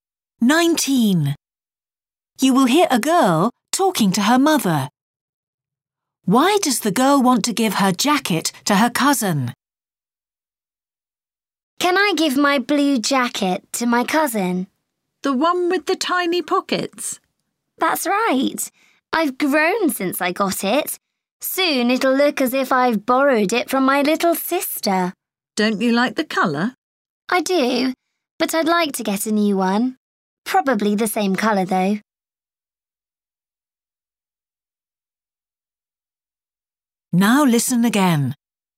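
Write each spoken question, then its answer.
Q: Why does the girl want to give her jacket to her cousin?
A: It is too small for her now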